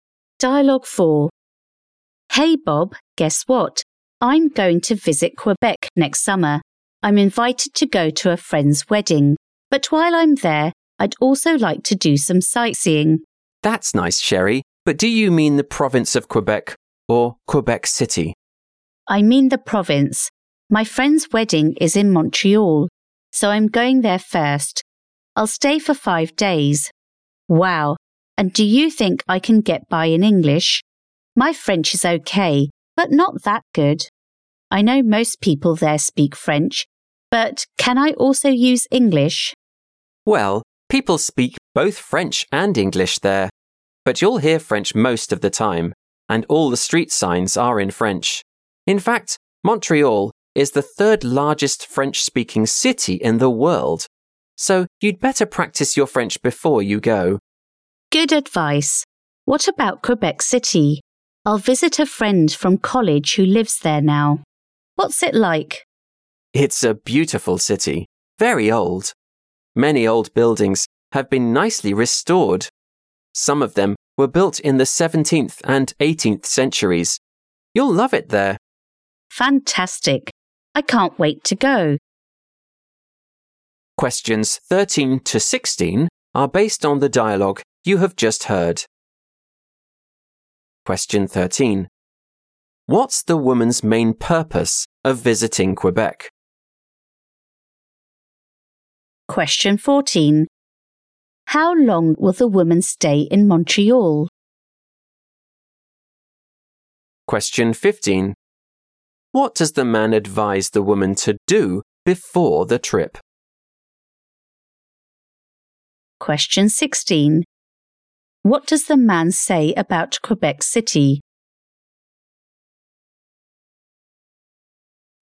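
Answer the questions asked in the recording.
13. To attend a friend's wedding
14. 5 days
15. Practice her French
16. It's a beautiful old city with many restored old buildings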